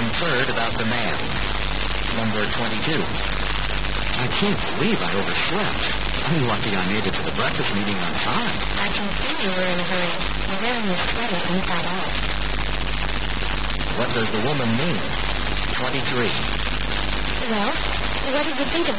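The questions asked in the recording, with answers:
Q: What does the woman mean?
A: His sweater is on inside out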